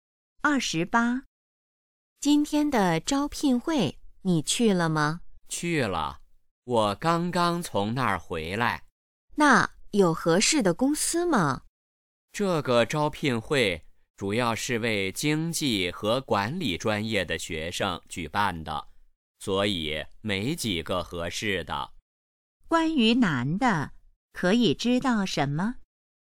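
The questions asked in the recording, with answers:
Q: 关于男的,可以知道什么?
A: 去了招聘会,没找到合适的公司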